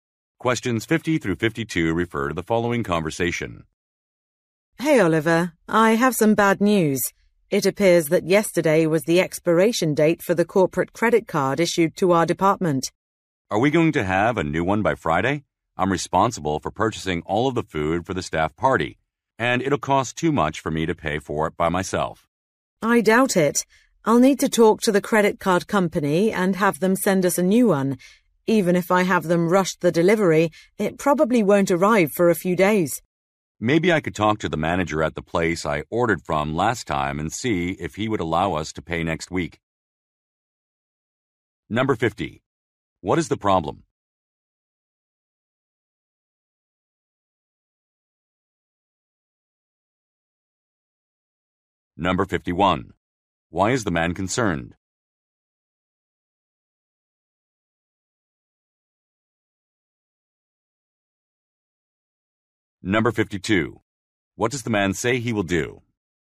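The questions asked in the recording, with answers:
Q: What is the problem?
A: The department's corporate credit card has expired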